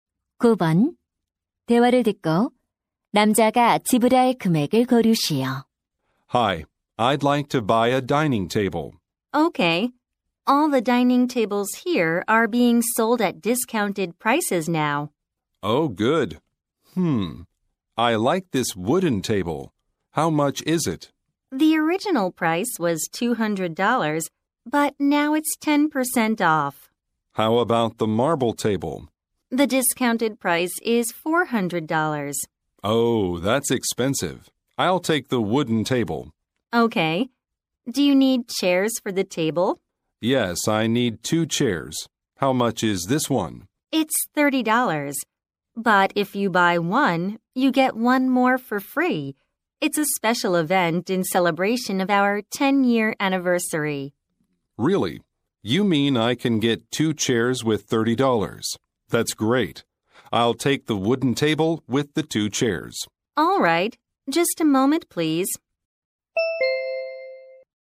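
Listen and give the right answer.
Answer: $210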